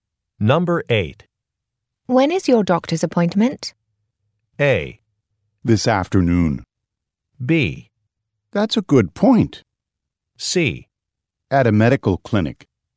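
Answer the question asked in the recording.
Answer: A: This afternoon.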